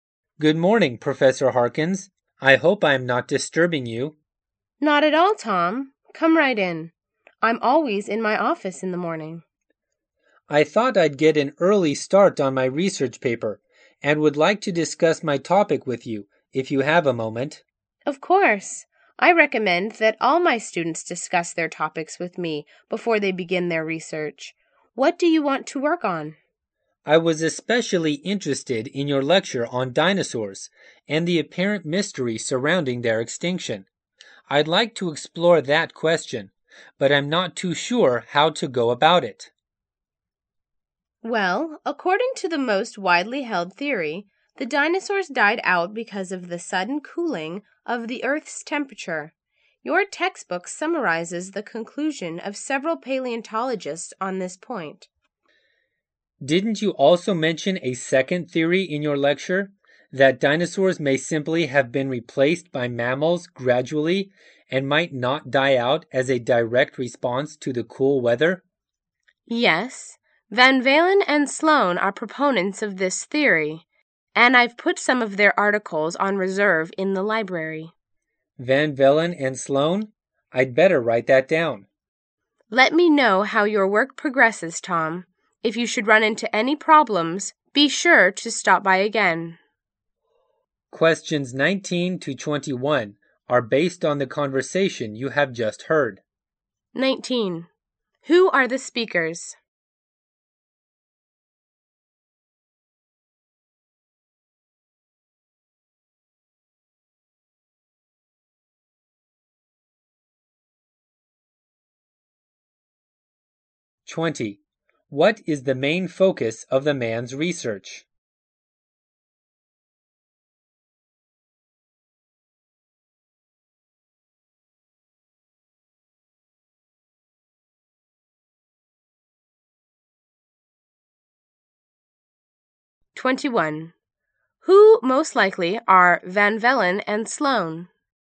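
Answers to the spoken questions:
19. A professor and a student.
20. Why the dinosaurs died out.
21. Scientists who think mammals gradually replaced dinosaurs.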